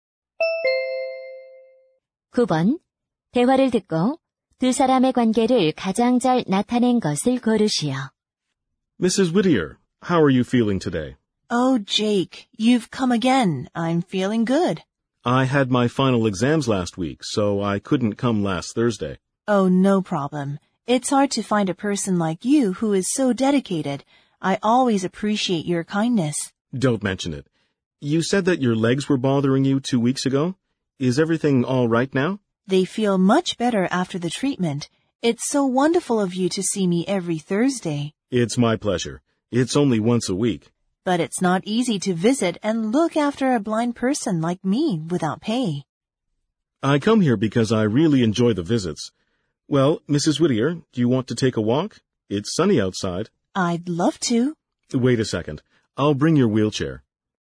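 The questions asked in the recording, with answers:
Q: 대화를 듣고 두 사람의 관계를 가장 잘 나타낸 것을 고르시오.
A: 자원봉사자 - 시각장애인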